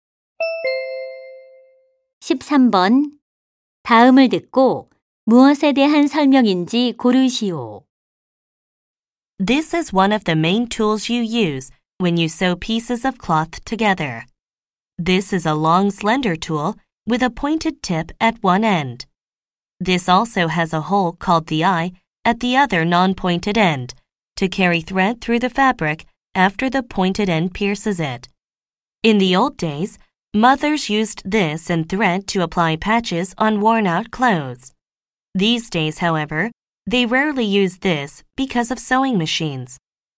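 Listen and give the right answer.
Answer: 바늘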